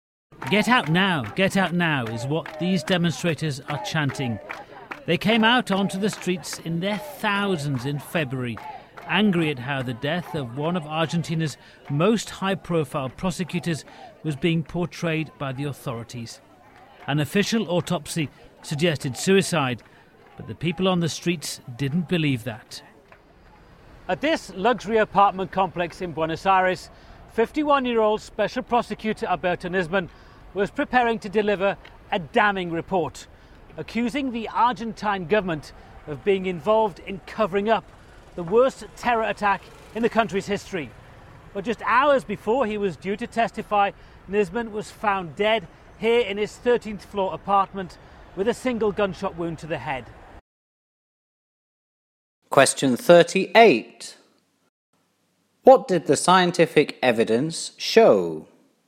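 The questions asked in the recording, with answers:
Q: What did the scientific evidence show?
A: The official autopsy suggested suicide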